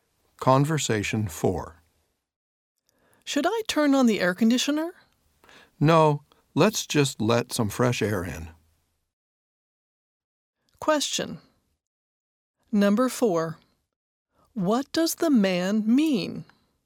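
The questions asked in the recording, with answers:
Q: What does the man mean?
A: He wants to open a window instead of using the air conditioner.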